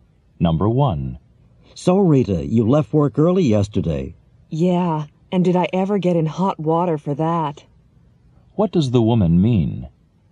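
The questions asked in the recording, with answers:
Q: What does the woman mean?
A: She got in trouble for leaving work early.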